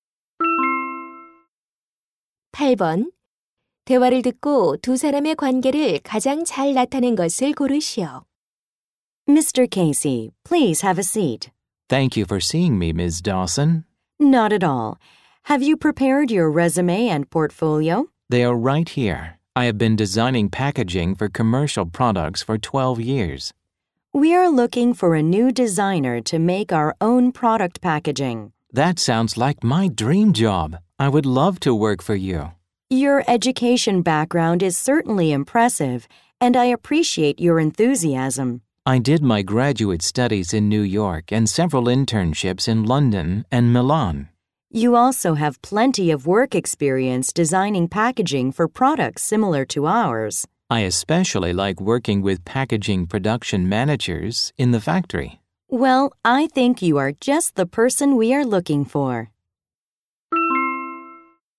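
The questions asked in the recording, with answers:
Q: 대화를 듣고 두 사람의 관계를 가장 잘 나타낸 것을 고르시오.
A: 면접관과 입사 지원자 (포장 디자이너)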